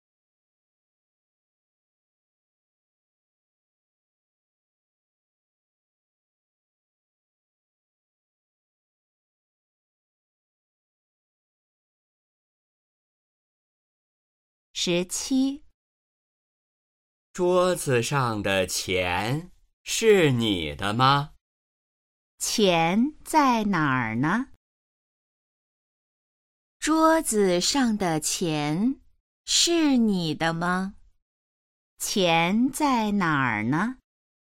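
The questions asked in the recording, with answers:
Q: 钱在哪儿呢?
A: 桌子上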